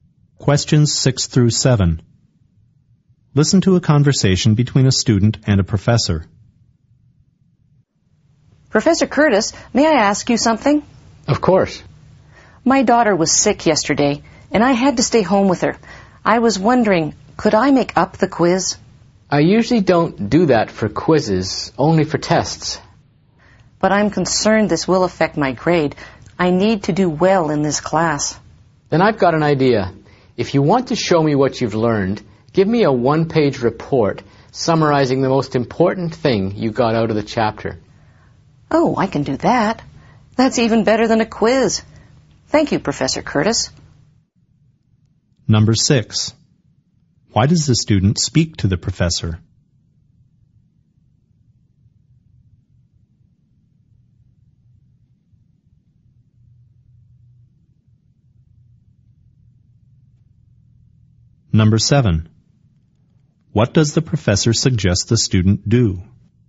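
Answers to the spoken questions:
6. To ask if she can make up the quiz she missed
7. Write a one-page report summarizing the most important thing from the chapter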